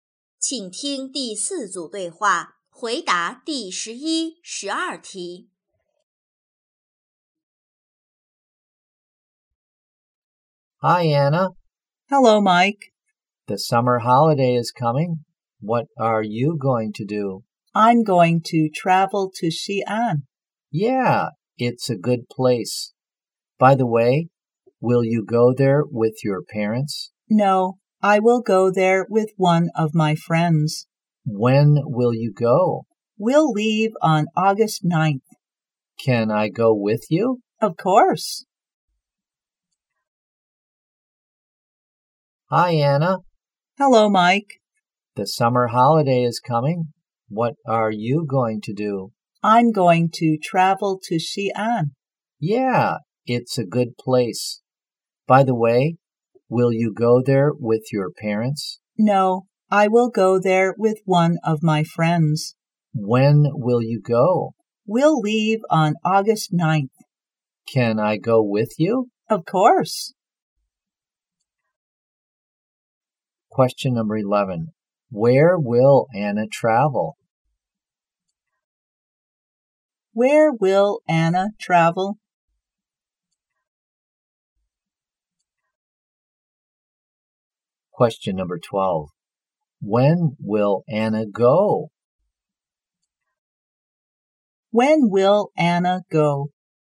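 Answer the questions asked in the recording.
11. Xi'an
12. On August 9th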